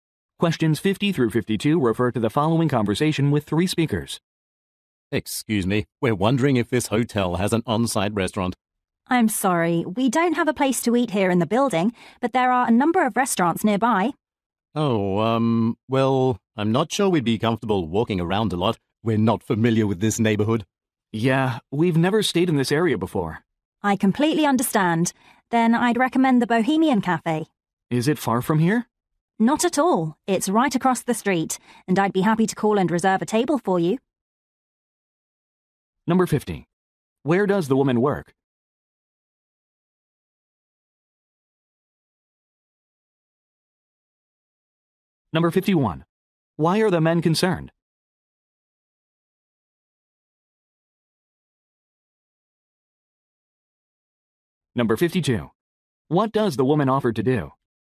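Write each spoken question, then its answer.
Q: Where does the woman work?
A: At a hotel

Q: Why are the men concerned?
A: They are unfamiliar with the neighborhood

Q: What does the woman offer to do?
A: Reserve a table at the Bohemian Cafe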